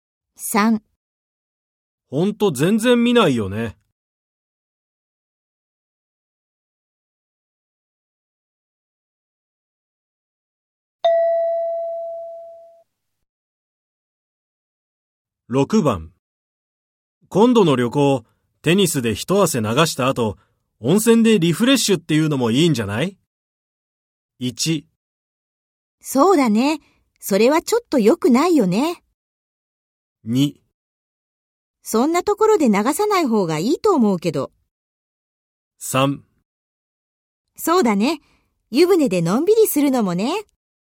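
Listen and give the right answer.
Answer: 3: そうだね。湯船でのんびりするのもね。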